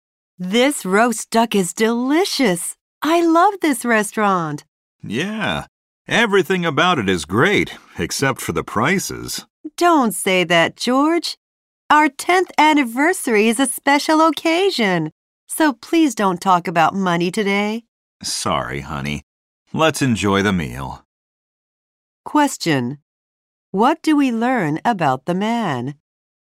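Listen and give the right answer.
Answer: He thinks the restaurant's prices are high.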